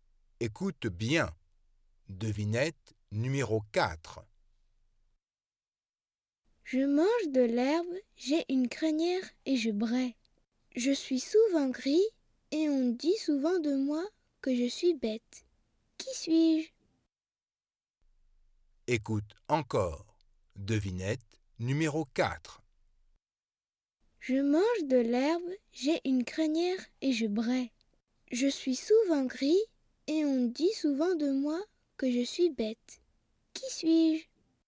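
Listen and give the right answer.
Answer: un âne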